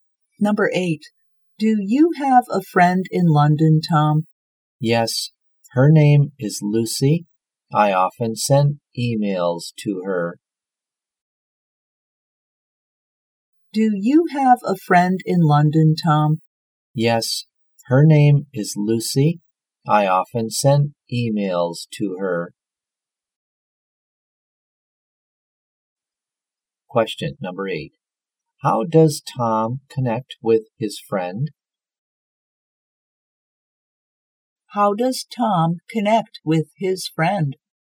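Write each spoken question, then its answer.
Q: How does Tom connect with his friend?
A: By sending emails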